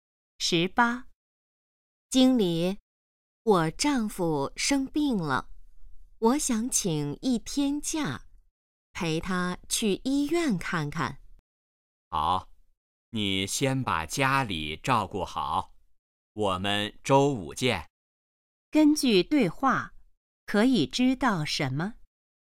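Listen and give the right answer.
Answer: 女的要请假陪丈夫去医院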